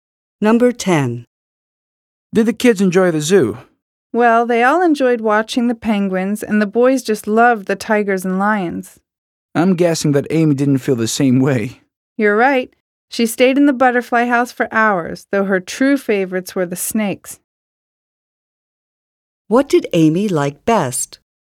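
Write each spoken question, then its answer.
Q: What did Amy like best?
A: The snakes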